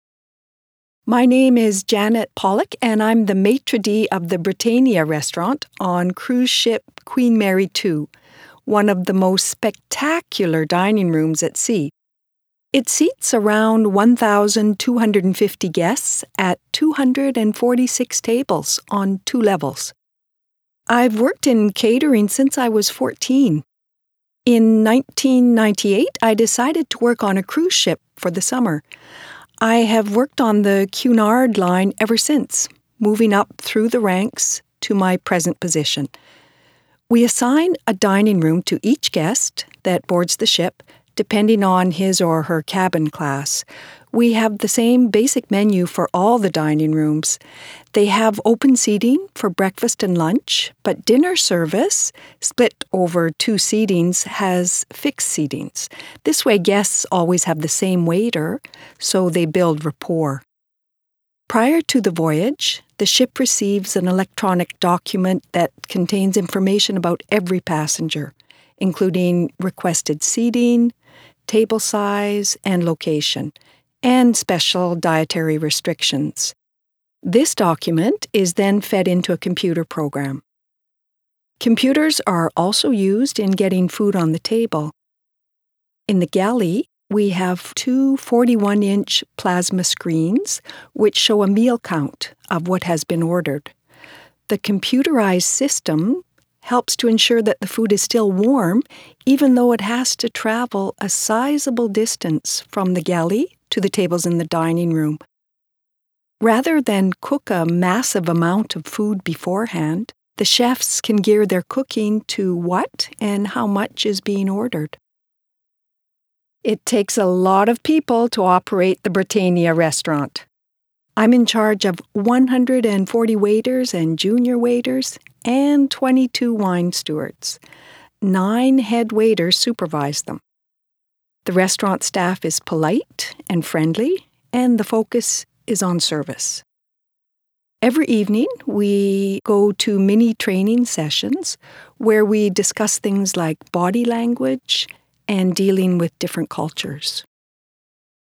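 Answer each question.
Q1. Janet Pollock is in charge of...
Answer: the Britannia restaurant on the Queen Mary II (as maitre d')

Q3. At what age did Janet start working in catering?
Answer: 14

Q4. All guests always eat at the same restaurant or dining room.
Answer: False

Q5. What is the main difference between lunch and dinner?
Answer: Lunch has open seating; dinner has fixed seatings over two sittings

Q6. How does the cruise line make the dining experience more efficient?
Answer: By using computers: passenger data program and screens showing meal counts in the galley

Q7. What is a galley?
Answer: The ship's kitchen

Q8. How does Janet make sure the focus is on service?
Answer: Mini training sessions every evening on body language and different cultures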